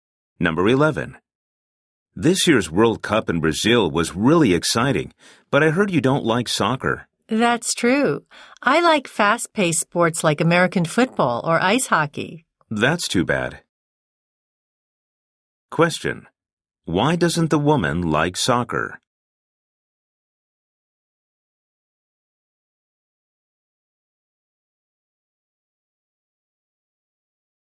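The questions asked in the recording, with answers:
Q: Why doesn't the woman like soccer?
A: She prefers fast-paced sports like American football or ice hockey.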